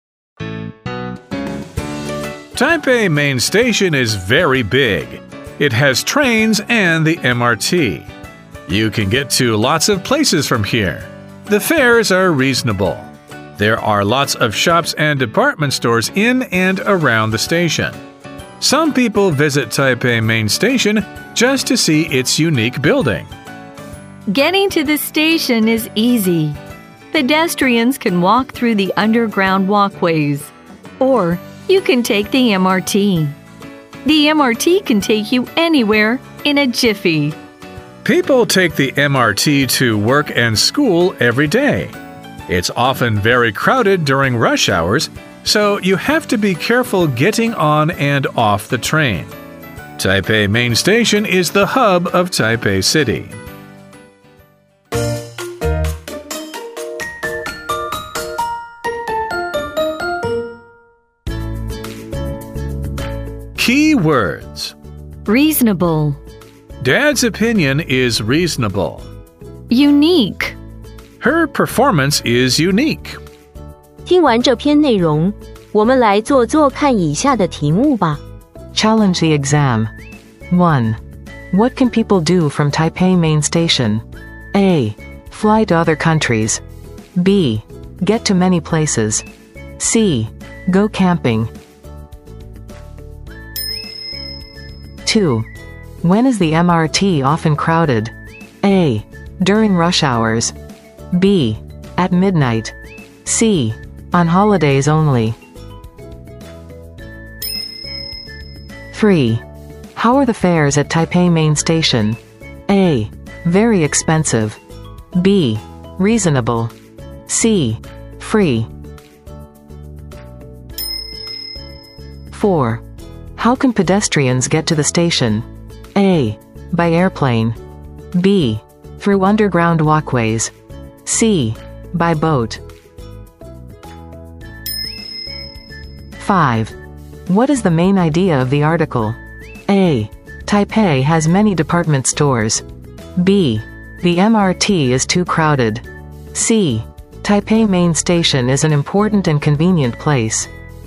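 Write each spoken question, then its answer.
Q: What can people do from Taipei Main Station?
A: B: Get to many places.

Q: When is the MRT often crowded?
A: A: During rush hours.

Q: How are the fares at Taipei Main Station?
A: B: Reasonable.

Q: How can pedestrians get to the station?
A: B: Through underground walkways.

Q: What is the main idea of the article?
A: C: Taipei Main Station is an important and convenient place.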